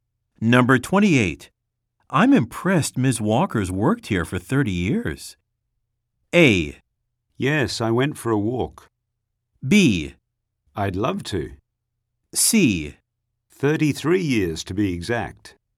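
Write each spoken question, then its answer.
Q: I'm impressed Ms.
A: C: 33 years to be exact.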